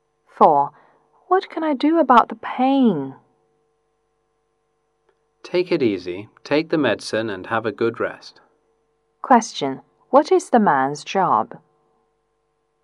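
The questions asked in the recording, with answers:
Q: What is the man's job?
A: A doctor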